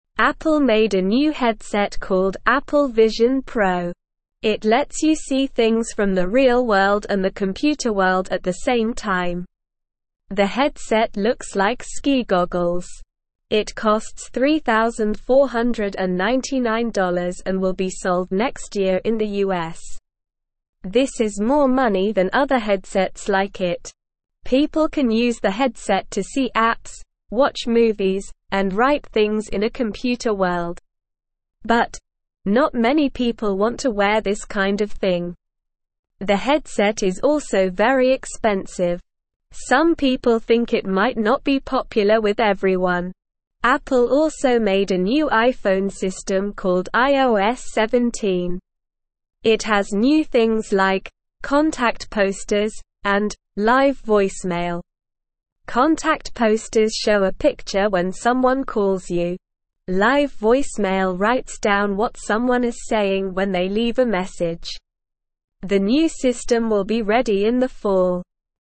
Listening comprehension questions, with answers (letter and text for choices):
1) The headset looks like (2)________ goggles.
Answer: ski

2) It costs $3,499 and will be sold next year in the (3)________.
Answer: US

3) People can use the headset to see apps, watch movies, and write things in a (4)________ world.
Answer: computer

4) Apple also made a new iPhone system called (5)________.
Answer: iOS17

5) Live voicemail writes down what someone is saying when they leave a (6)________.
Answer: message

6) The new system will be ready in the (7)________.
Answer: fall

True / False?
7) Apple made a new headset called Apple Vision Pro.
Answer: True

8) The headset looks like a big hat.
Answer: False

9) It costs $3,499 and will be sold next year in the US.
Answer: True

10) The headset is very expensive.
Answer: True

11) People can use the headset to see apps and watch movies.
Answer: True

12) Everyone wants to wear this kind of thing.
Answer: False

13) Apple made a new iPhone system called iOS17.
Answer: True

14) Contact posters show a picture when someone sends you a text.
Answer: False

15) What is the name of the new headset made by Apple?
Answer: The new headset is called Apple Vision Pro.

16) What can you see with the Apple Vision Pro headset?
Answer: You can see things from the real world and the computer world at the same time.

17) What does the headset look like?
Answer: The headset looks like ski goggles.

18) How much does the Apple Vision Pro cost?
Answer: It costs $3,499.

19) When will the headset be sold in the US?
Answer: The headset will be sold next year in the US.

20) What can people use the headset for?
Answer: People can use the headset to see apps, watch movies, and write things in a computer world.

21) What are two new things in the iPhone system iOS17?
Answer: Two new things in iOS17 are "contact posters" and "live voicemail."

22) What is the new headset called?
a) Apple Vision Pro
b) Ski Goggles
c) Computer World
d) iPhone System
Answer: a) Apple Vision Pro

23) What does the Apple Vision Pro headset look like?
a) Sunglasses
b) A hat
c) A mask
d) Ski goggles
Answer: d) Ski goggles

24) How much does the Apple Vision Pro headset cost?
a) $1,499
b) $2,499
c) $3,499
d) $4,499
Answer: c) $3,499

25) When will the Apple Vision Pro headset be sold?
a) This year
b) Next year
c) In the fall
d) In the summer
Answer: b) Next year

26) What can people do with the Apple Vision Pro headset?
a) Cook food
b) Drive a car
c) See apps and watch movies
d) Swim underwater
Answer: c) See apps and watch movies

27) Why might the Apple Vision Pro headset not be popular?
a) It is too small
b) It is very expensive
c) It is too heavy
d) It is not colorful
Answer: b) It is very expensive

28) What does "live voicemail" do?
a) Takes pictures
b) Makes phone calls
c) Shows movies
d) Writes down messages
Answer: d) Writes down messages

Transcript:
It lets you see things from the real world and the computer world at the same time. The headset looks like ski goggles. This is more money than other headsets like it.
People can use the headset to see apps, watch movies, and write things in a computer world. But, not many people want to wear this kind of thing. The headset is also very expensive. Some people think it might not be popular with everyone.
Apple also made a new iPhone system called iOS17. It has new things like "contact posters" and "live voicemail." Contact posters show a picture when someone calls you. Live voicemail writes down what someone is saying when they leave a message. The new system will be ready in the fall.

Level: Level 1